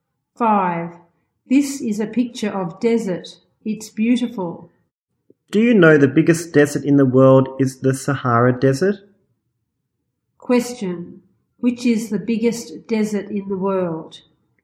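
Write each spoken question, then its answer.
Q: Which is the biggest desert in the world?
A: The Sahara Desert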